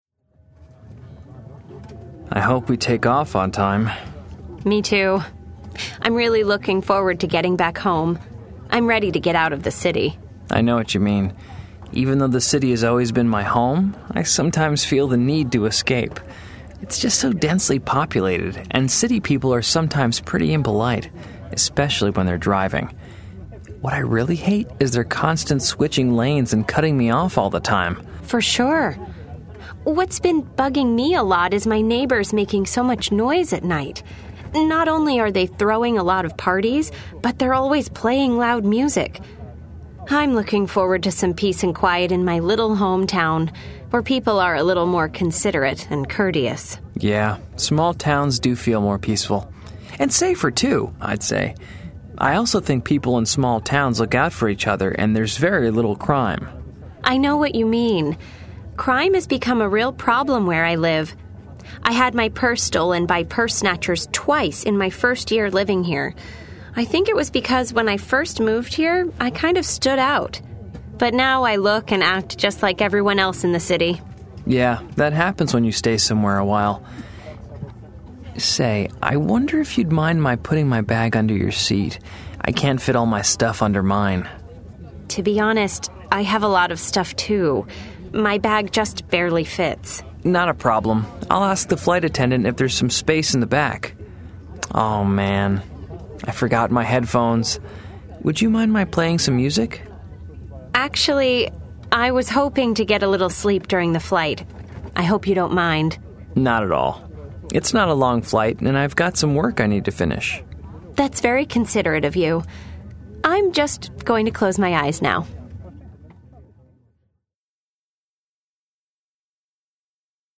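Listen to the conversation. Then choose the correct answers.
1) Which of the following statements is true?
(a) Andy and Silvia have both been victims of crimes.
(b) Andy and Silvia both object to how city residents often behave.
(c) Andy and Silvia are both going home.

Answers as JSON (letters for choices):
{"1": "c"}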